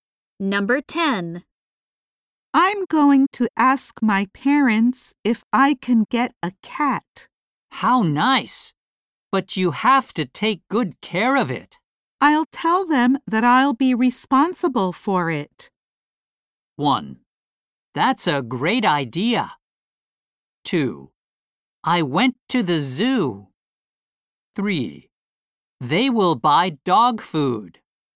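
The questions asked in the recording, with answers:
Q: I'll tell them that I'll be responsible for it.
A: 1: That's a great idea.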